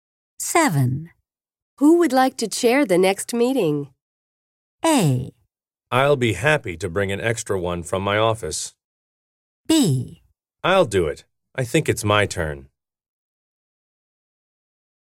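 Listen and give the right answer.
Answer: B: I'll do it. I think it's my turn.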